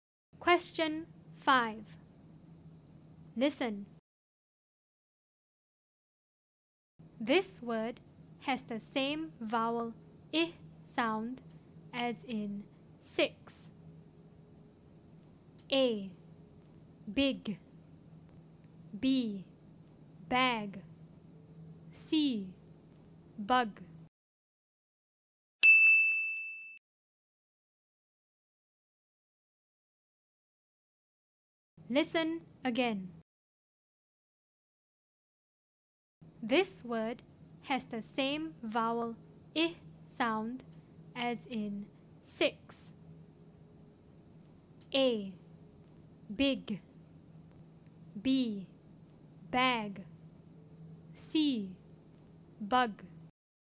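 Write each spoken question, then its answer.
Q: This word has the same vowel I sound as in 6.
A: A: Big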